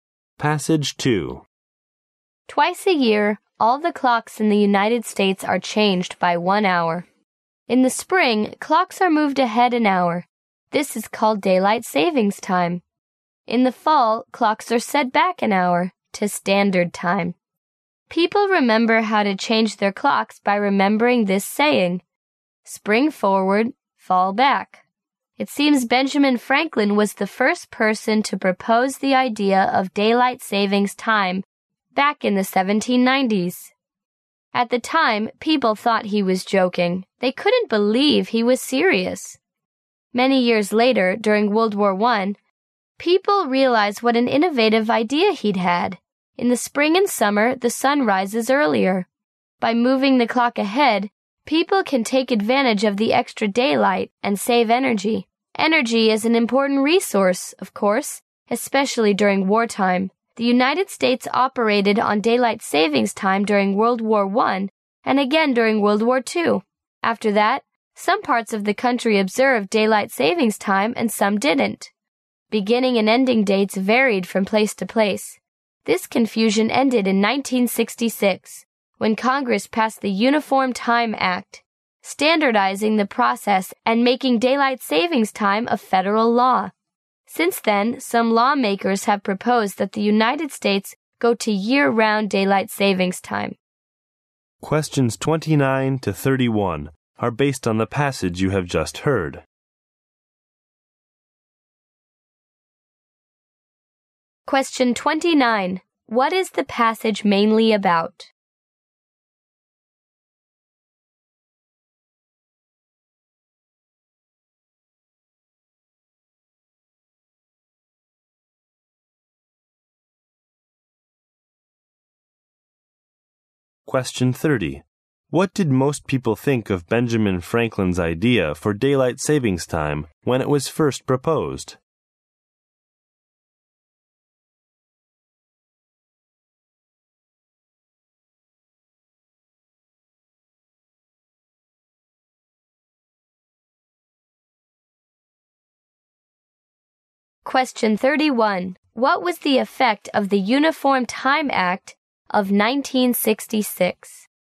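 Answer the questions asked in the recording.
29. Daylight saving time in the United States
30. They thought he was joking.
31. It standardized daylight saving time and made it federal law.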